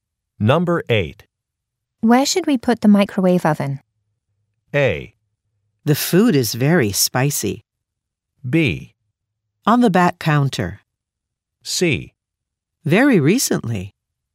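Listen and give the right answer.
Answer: B: On the back counter.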